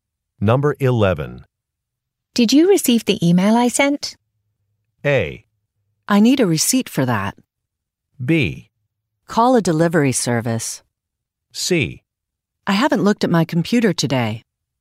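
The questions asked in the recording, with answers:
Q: Did you receive the email I sent?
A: C: I haven't looked at my computer today.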